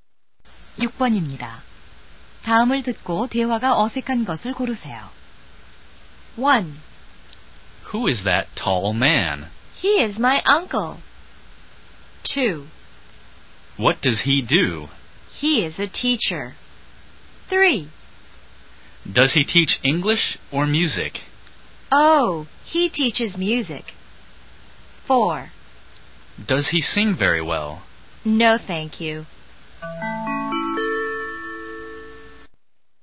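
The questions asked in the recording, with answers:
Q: 다음을 듣고 대화가 어색한 것을 고르세요.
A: 4: Does he sing very well? / No, thank you.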